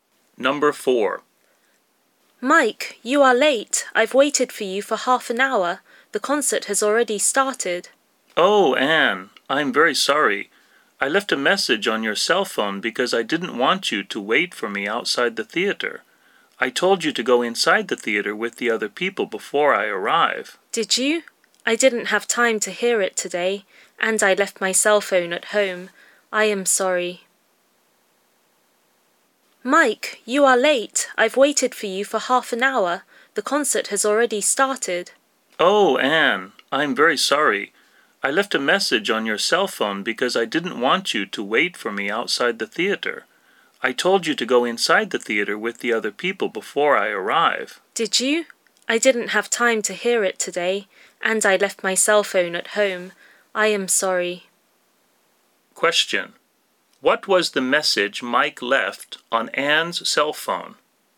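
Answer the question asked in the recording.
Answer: To go inside the theater with the other people before he arrived.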